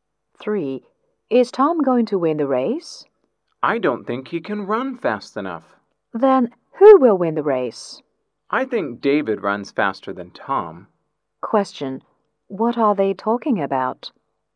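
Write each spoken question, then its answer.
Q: Question, what are they talking about?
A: Who will win the race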